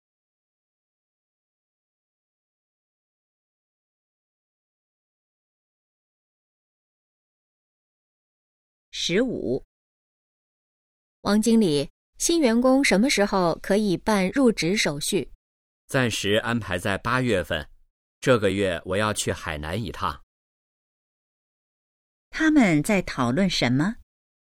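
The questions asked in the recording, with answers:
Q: 他们在讨论什么?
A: 新员工入职时间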